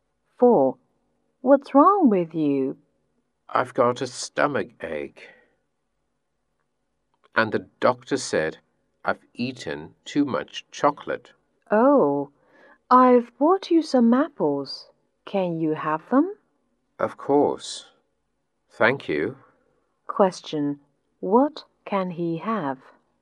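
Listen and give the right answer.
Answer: Apples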